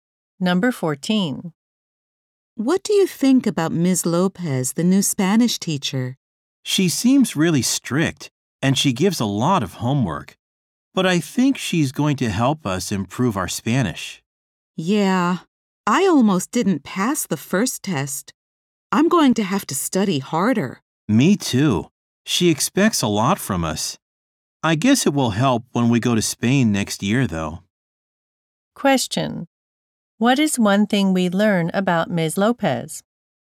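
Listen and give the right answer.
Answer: She is strict and gives a lot of homework.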